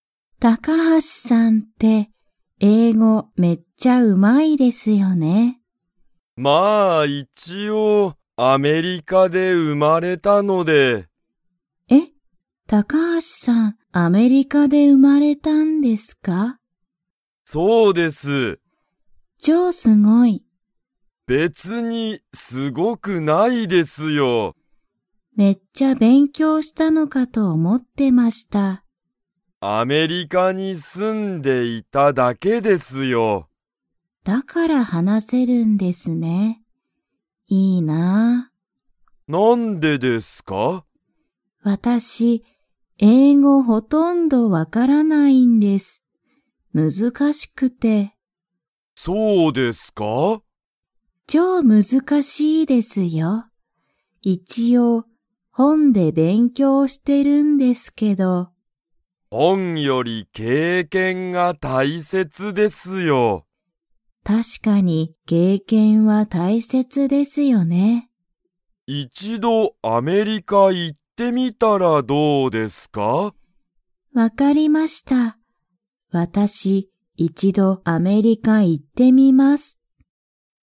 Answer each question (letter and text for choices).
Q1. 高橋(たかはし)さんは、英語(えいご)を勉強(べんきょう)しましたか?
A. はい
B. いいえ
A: B. いいえ

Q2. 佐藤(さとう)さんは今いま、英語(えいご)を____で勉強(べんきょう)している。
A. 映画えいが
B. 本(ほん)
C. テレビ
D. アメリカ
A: B. 本(ほん)

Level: Level 2